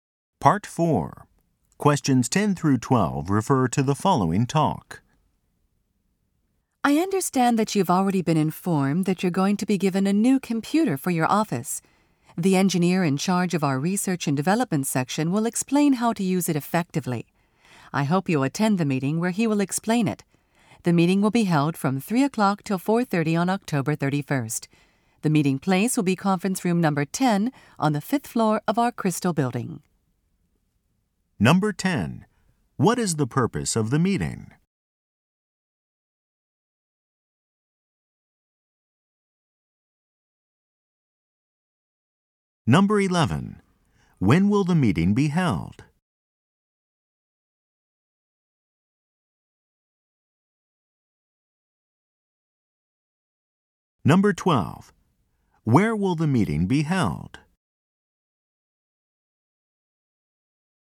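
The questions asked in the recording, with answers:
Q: What is the purpose of the meeting?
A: To explain how to use the new computer effectively

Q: When will the meeting be held?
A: From 3:00 to 4:30 on October 31st

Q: Where will the meeting be held?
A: Conference room 10 on the 5th floor of the Crystal Building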